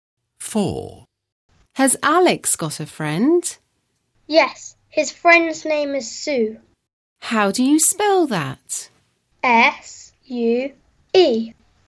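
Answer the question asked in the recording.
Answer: Sue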